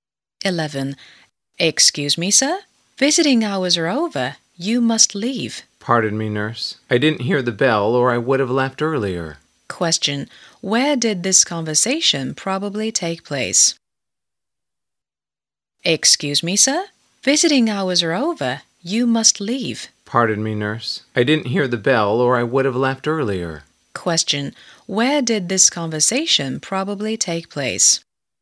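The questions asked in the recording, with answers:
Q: Question.Where did this conversation probably take place?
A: In a hospital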